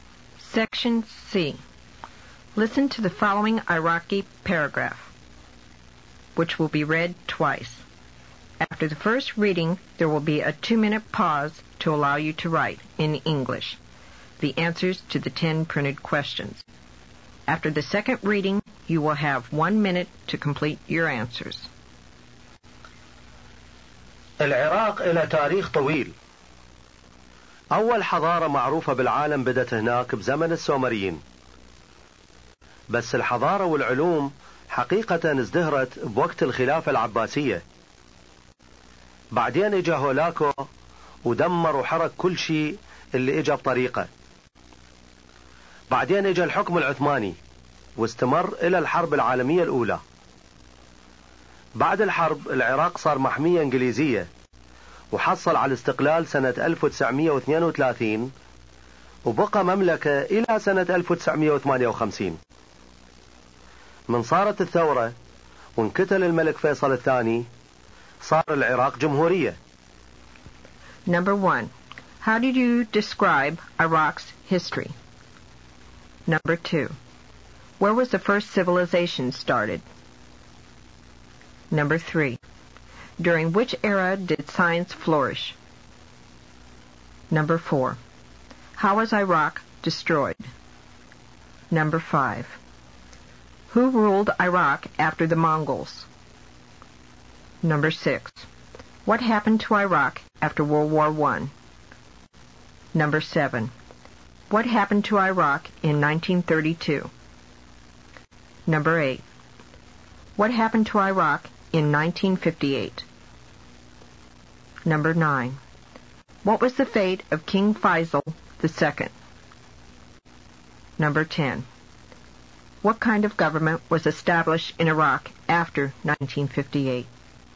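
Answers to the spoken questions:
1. Long
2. In Iraq, in the time of the Sumerians
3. The Abbasid Caliphate
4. Hulagu destroyed and burned everything in his way
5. The Ottomans
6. It became a British protectorate
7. It gained independence
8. A revolution; the monarchy ended
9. He was killed
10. A republic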